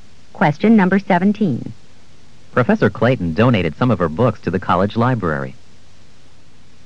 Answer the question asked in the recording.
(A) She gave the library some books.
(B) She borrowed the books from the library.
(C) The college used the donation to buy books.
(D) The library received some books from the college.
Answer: (A) She gave the library some books.

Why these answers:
Professor Clayton donated some of her books to the college library.

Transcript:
17. Professor Clayton donated some of her books to the college library.